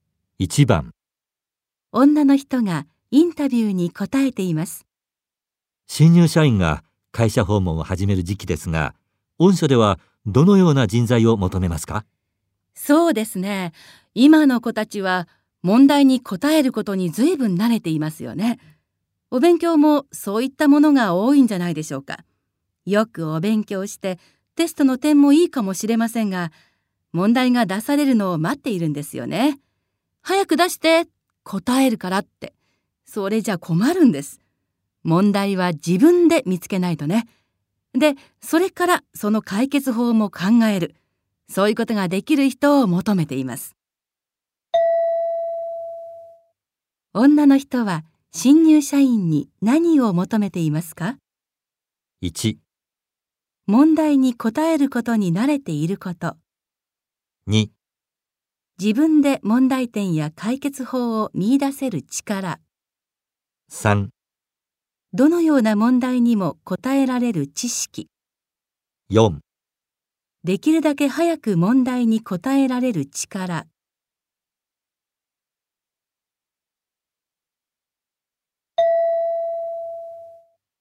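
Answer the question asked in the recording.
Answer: 2: 自分で問題点や解決法を見出せる力。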